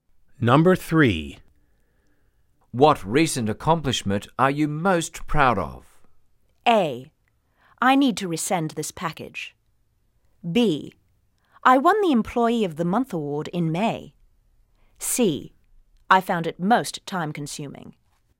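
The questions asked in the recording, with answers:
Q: What recent accomplishment are you most proud of?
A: B: I won the Employee of the Month award in May.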